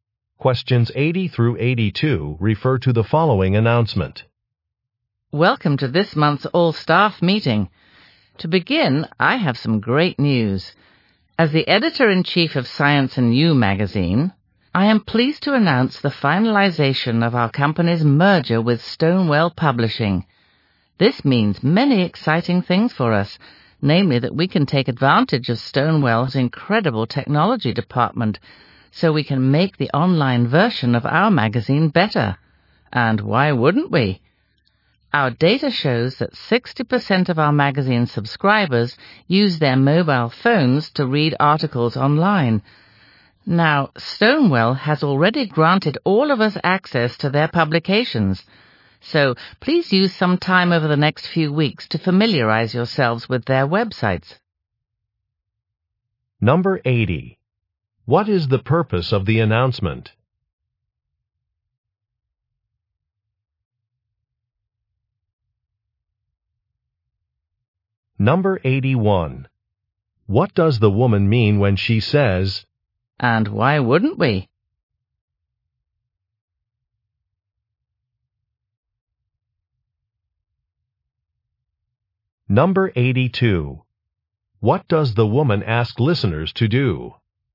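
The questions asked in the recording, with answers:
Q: What is the purpose of the announcement?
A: To announce a merger with Stonewell Publishing

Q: What does the woman ask listeners to do?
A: Familiarize themselves with Stonewell's websites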